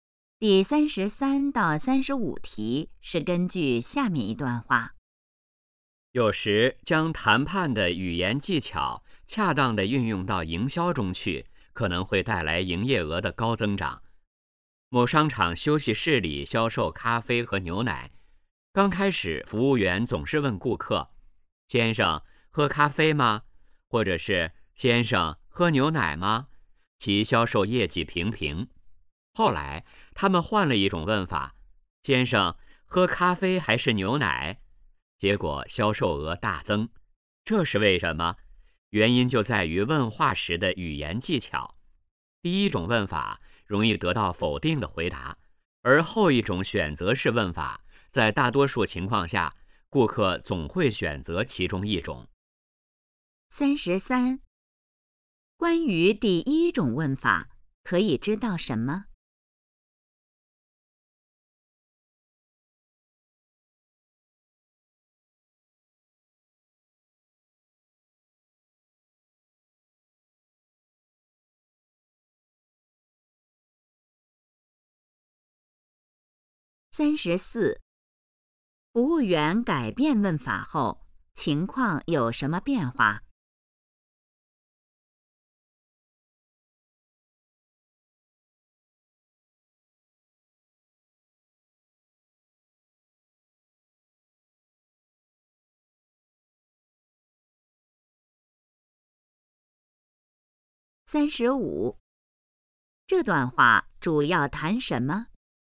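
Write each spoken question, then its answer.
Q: 关于第一种问法,可以知道什么?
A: 容易得到否定的回答

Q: 服务员改变问法后,情况有什么变化?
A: 销售额大增

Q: 这段话主要谈什么?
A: 问话的语言技巧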